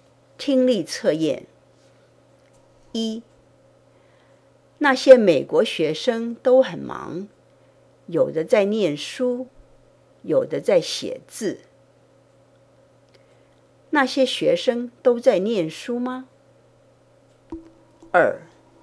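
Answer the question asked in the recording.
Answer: 不是,有的在念书,有的在写字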